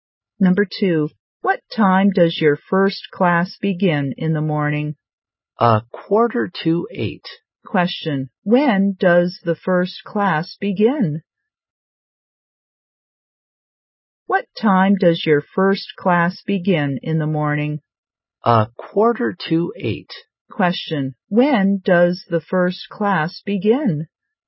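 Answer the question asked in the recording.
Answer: At 8:15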